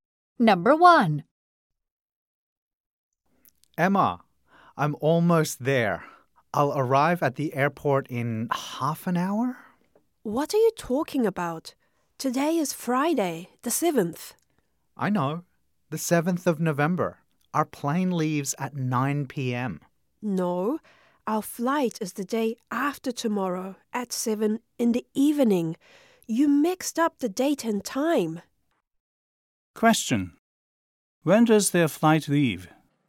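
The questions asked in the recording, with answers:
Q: When does their flight leave?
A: On Sunday, November 9th, at 7 p.m.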